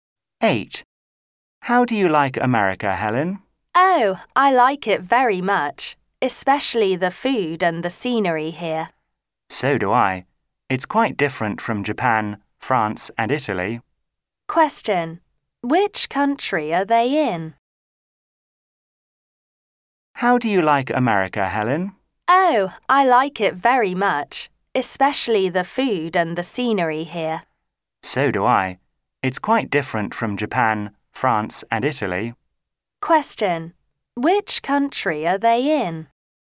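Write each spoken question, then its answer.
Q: Which country are they in?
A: America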